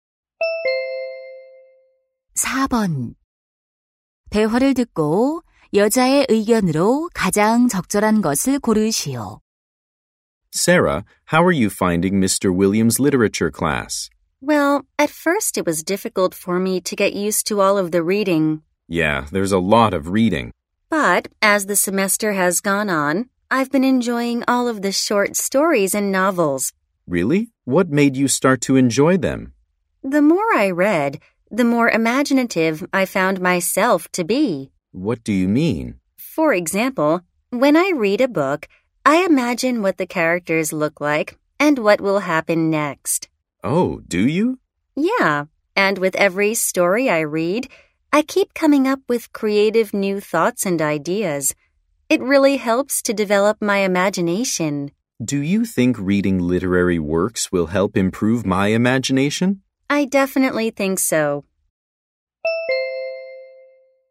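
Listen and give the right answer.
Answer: 문학 작품을 읽으면 상상력을 기르는 데 도움이 된다.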